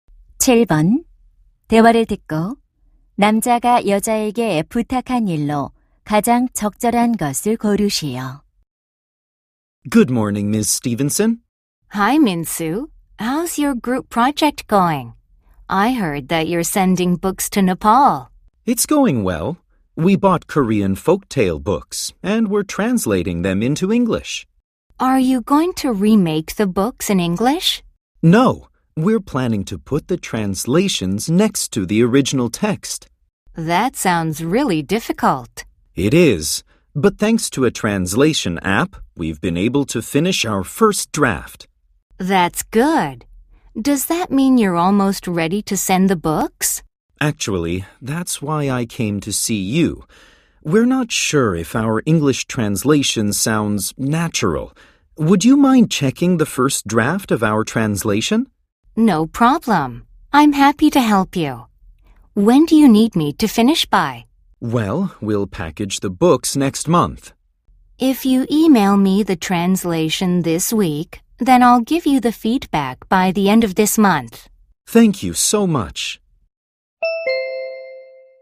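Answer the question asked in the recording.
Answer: 번역 초안 검토해 주기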